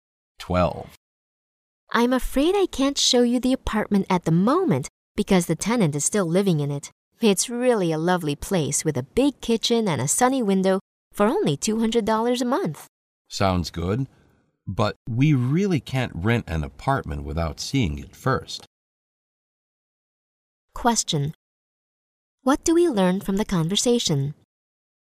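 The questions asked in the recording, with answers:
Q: What do we learn from the conversation?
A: They won't rent the apartment without seeing it first.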